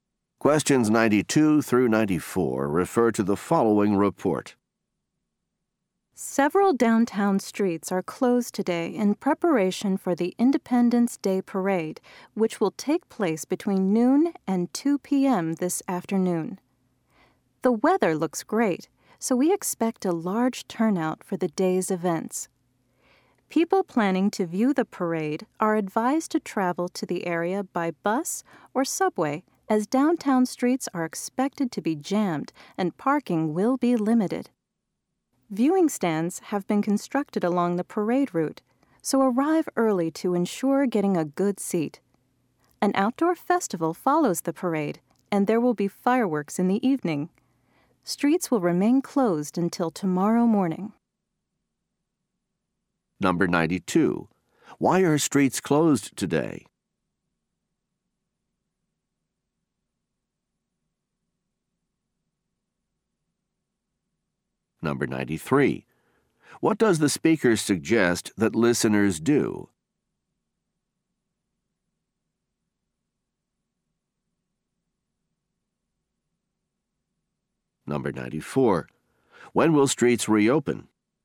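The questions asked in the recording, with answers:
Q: Why are streets closed today?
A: For the Independence Day Parade

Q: What does the speaker suggest that listeners do?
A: Travel by bus or subway

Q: When will streets reopen?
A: Tomorrow morning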